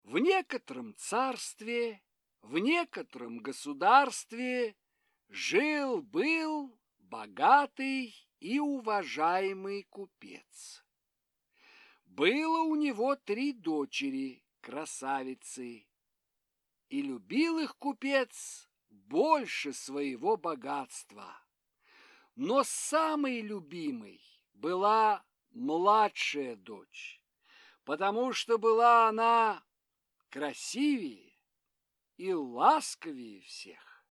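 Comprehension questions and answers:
Прослушайте фрагмент сказки. Ответьте на вопрос: кого купец любил больше всех?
кого купец любил больше всех?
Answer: младшую дочь

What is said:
В некотором царстве, в некотором государстве жил-был богатый и уважаемый купец. Было у него три дочери-красавицы. И любил их купец больше своего богатства. Но самой любимой была младшая дочь, потому что была она красивее и ласковее всех.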